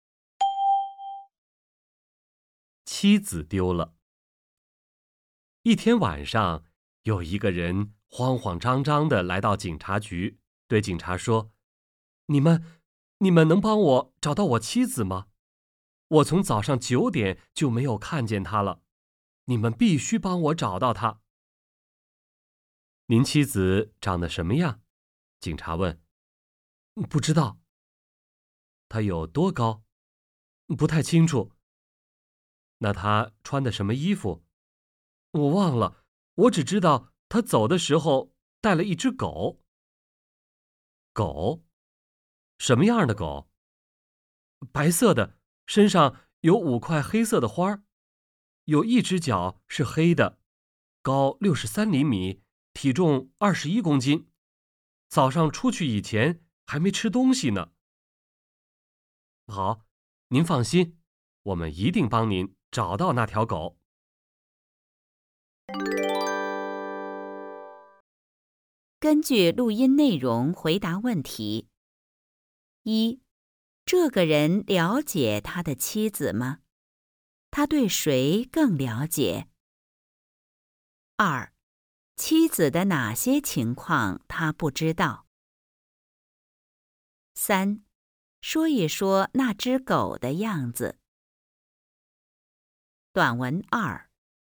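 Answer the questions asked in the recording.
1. 不了解,他对狗更了解
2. 长什么样、有多高、穿什么衣服
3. 白色的,身上有5块黑色的花,一只脚是黑的,高63厘米,体重21公斤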